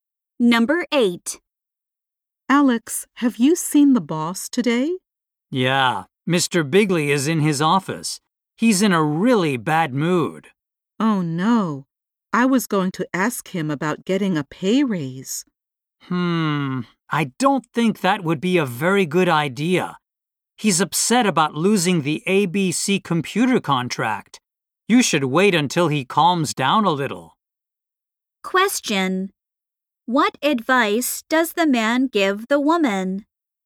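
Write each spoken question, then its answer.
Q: What advice does the man give the woman?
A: Wait until the boss calms down before asking for a raise.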